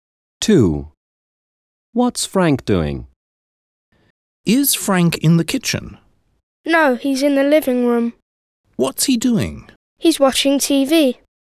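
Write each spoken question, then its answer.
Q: What's Frank doing?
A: watching TV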